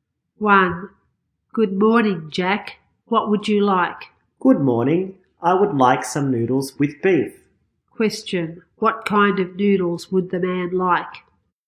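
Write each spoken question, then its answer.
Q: What kind of noodles would the man like?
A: Beef noodles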